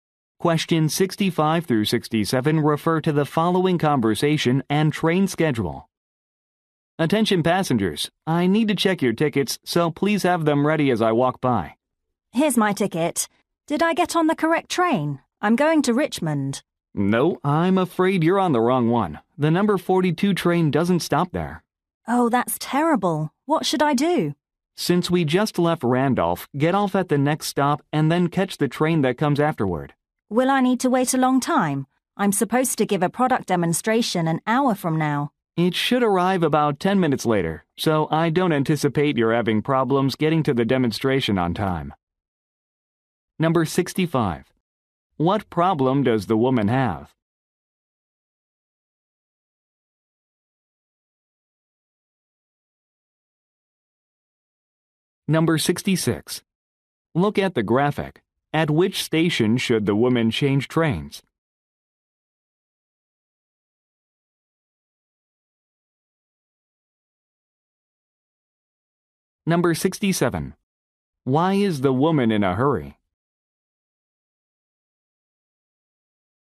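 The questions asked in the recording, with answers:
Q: What problem does the woman have?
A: She is on the wrong train.

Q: Why is the woman in a hurry?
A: She has to give a product demonstration.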